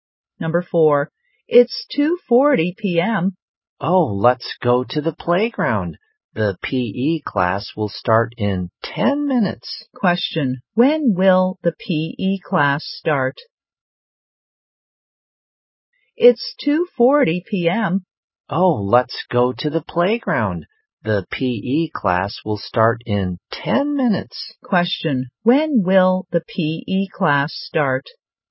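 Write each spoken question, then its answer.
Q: When will the P.E. class start?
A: At 2:50 p.m.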